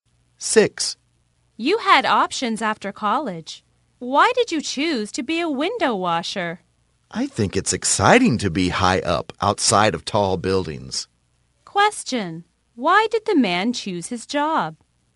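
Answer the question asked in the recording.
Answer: He finds it exciting to be high up outside tall buildings.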